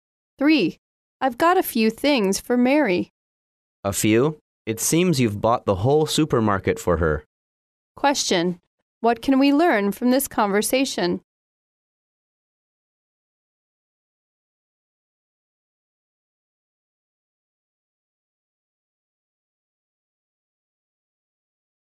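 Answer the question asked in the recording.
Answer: The man bought a lot of things for Mary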